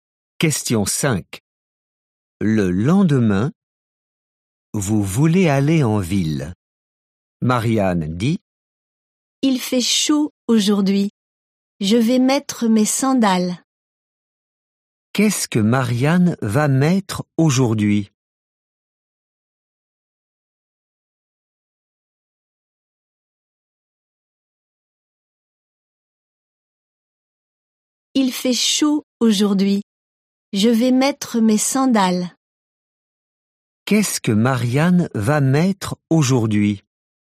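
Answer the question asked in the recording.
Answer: Ses sandales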